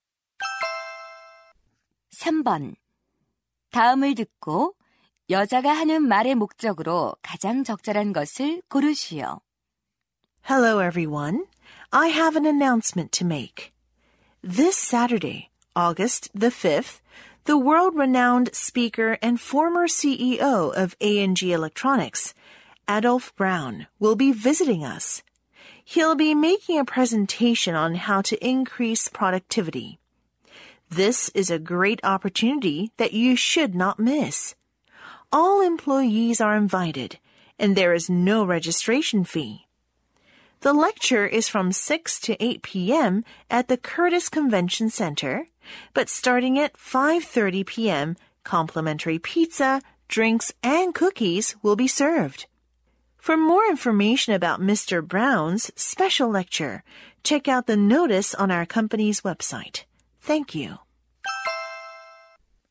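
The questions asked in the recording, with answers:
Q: 다음을 듣고 여자가 하는 말의 목적으로 가장 적절한 것을 고르시오.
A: Adolph Brown의 특별 강연을 홍보하고 참석을 권장하려고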